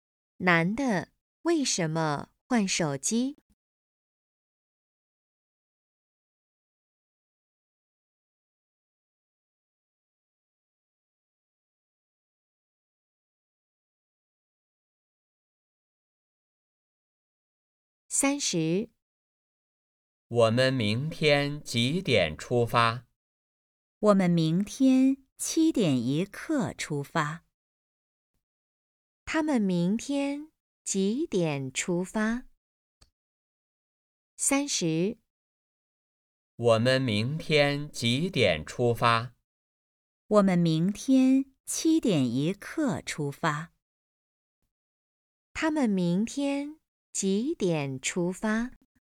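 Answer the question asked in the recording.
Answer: 七点一刻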